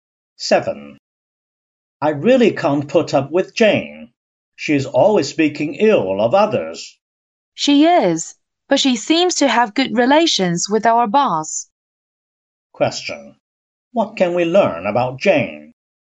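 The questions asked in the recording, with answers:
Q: What can we learn about Jane?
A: She speaks ill of others but gets along well with the boss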